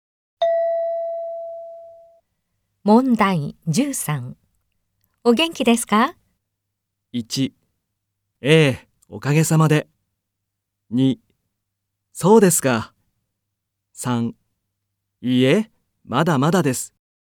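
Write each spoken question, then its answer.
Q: お元気ですか?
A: 1: ええ、おかげさまで。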